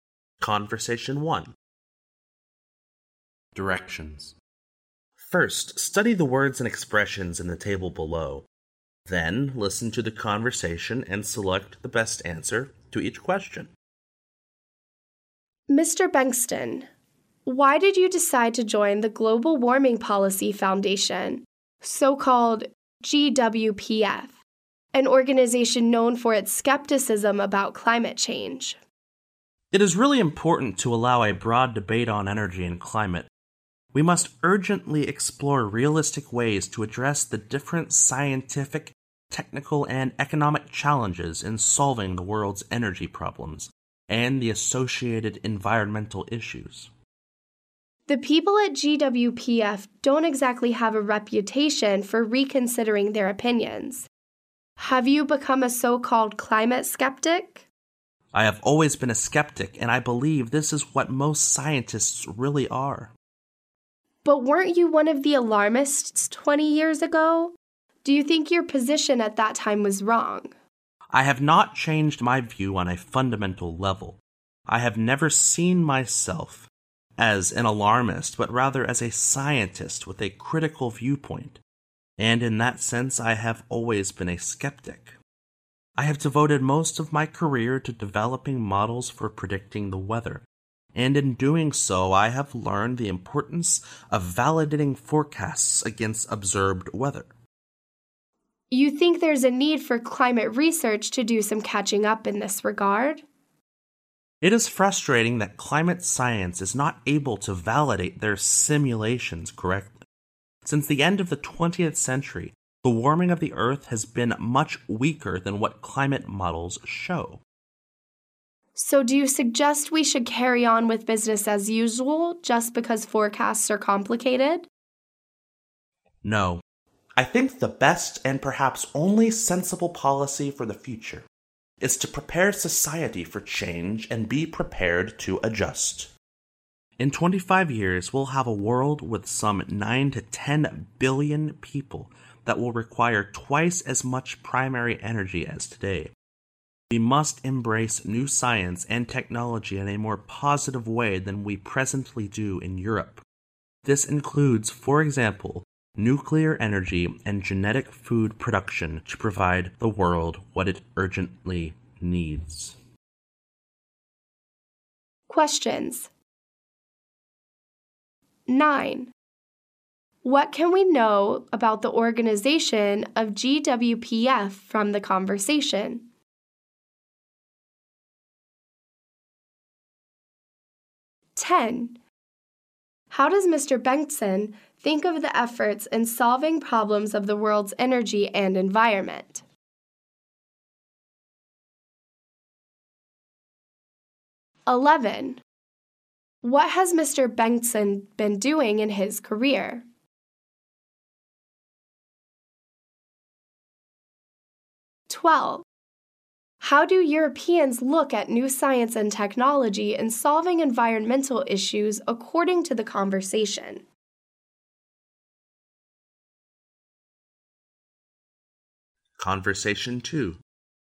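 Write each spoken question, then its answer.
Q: What can we know about the organization of GWPF from the conversation?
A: It is known for its skepticism about climate change.

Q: What has Mr. Bengtson been doing in his career?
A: Developing models for predicting the weather.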